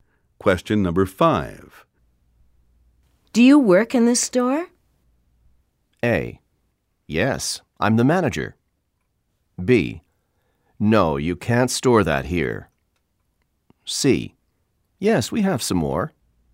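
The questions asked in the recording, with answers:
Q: Do you work in this store?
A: A: Yes, I'm the manager.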